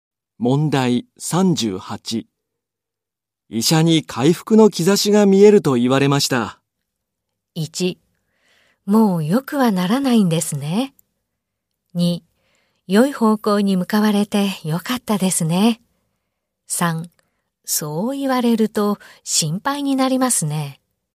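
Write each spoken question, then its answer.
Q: 医者に回復の兆しが見えると言われました。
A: 2: 良い方向に向かわれてよかったですね。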